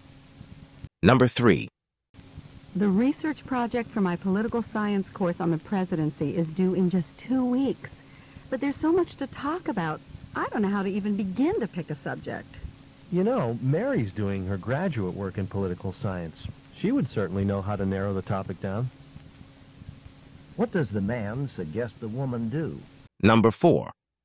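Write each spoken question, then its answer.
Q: What does the man suggest the woman do?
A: Ask Mary to help her narrow down the topic.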